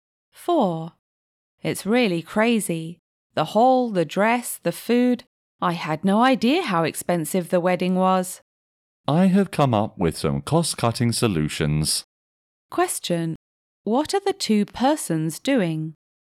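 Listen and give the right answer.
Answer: Planning a wedding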